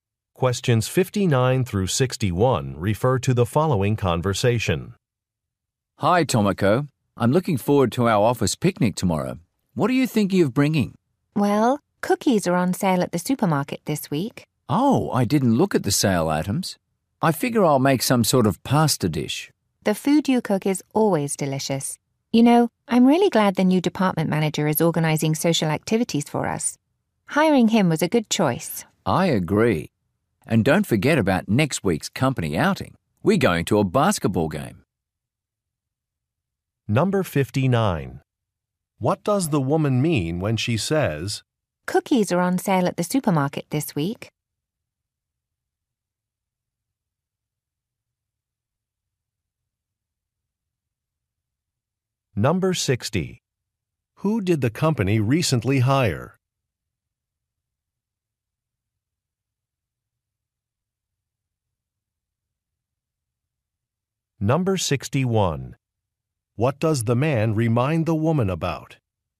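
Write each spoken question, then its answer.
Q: Who did the company recently hire?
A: A department manager

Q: What does the man remind the woman about?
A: Next week's company outing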